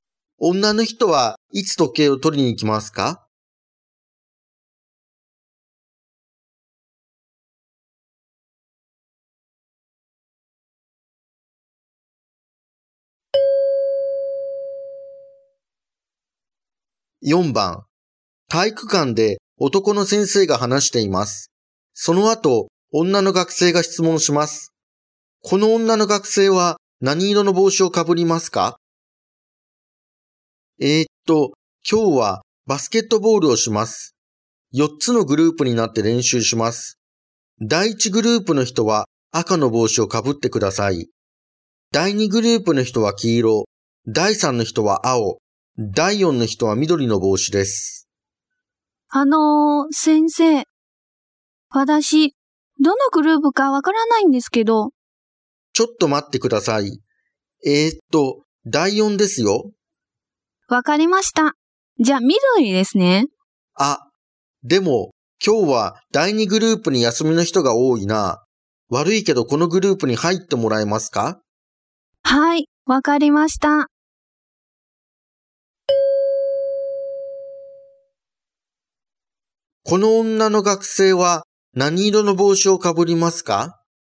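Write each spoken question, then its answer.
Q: この女の学生は何色の帽子をかぶりますか?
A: 黄色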